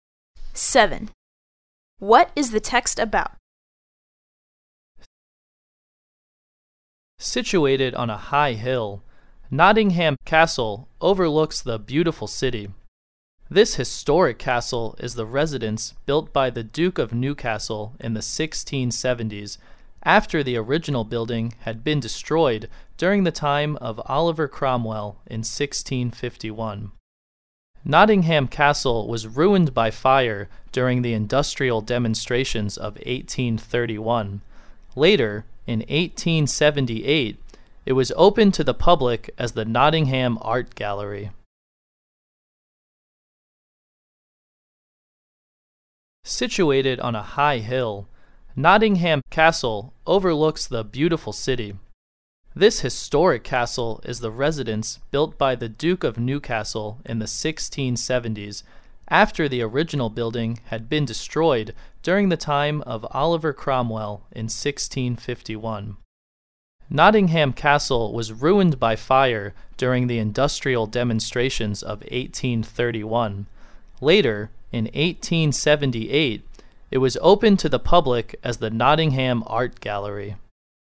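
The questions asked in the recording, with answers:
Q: What is the text about?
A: The history of Nottingham Castle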